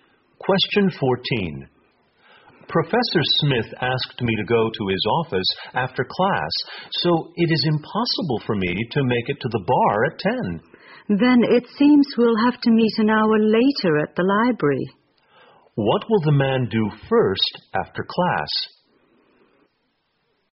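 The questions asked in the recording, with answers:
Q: What will the man do first after class?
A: Go to Professor Smith's office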